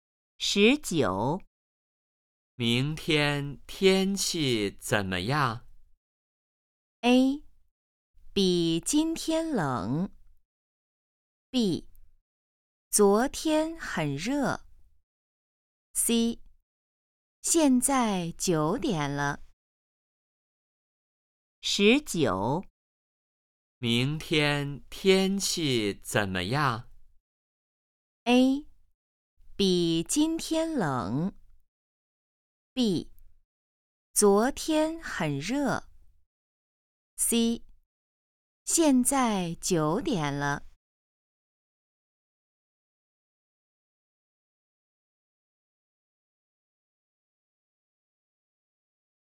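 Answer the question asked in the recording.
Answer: A: 比今天冷。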